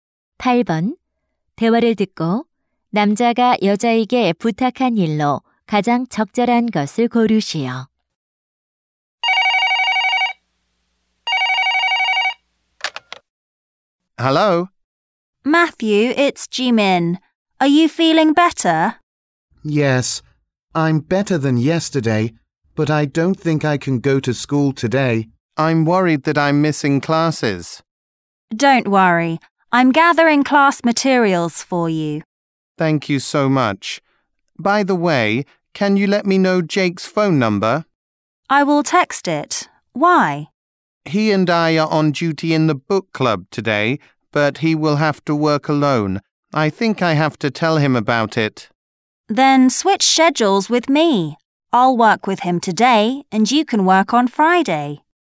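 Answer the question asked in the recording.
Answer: Jake의 전화번호 알려주기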